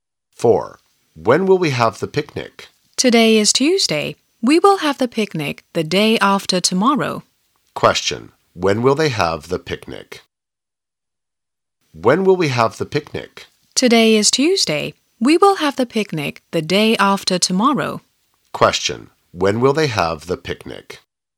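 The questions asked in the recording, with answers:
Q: When will they have the picnic?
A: On Thursday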